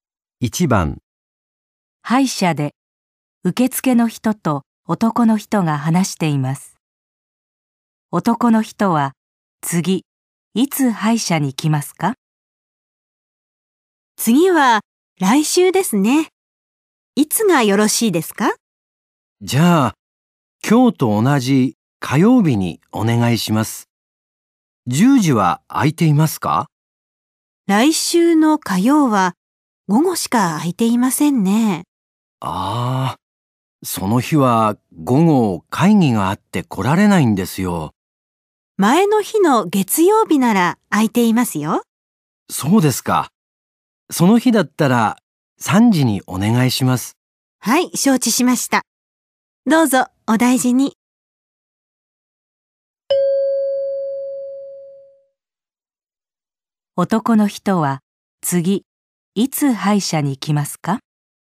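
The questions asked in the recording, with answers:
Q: 男の人は次、いつ歯医者に来ますか?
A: 来週の月曜日の3時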